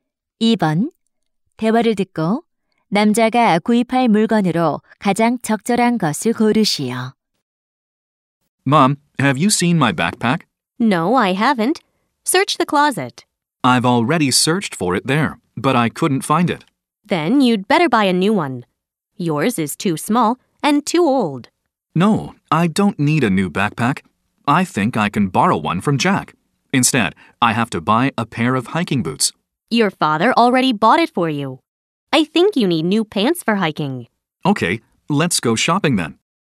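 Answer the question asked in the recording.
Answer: 등산 바지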